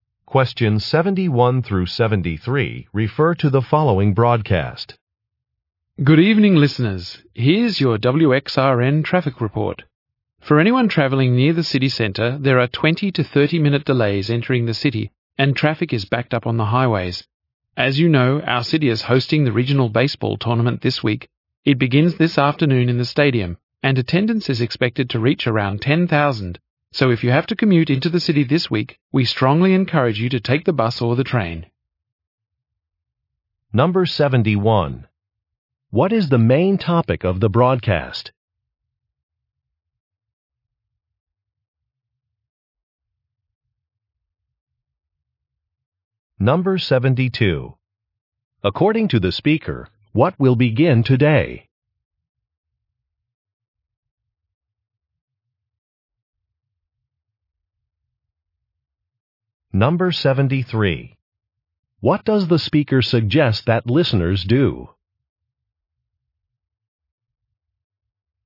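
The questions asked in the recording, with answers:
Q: What is the main topic of the broadcast?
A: Traffic delays entering the city

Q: According to the speaker, what will begin today?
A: The regional baseball tournament

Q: What does the speaker suggest that listeners do?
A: Take the bus or the train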